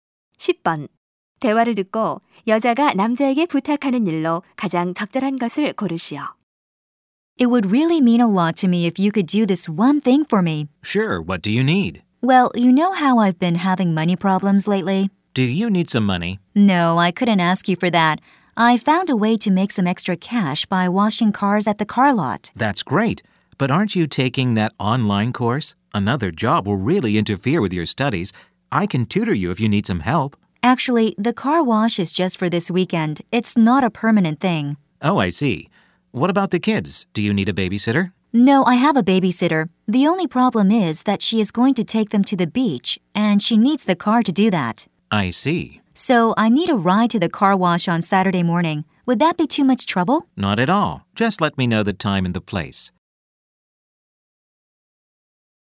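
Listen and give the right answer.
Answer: 토요일 아침 세차장까지 차로 태워다 주기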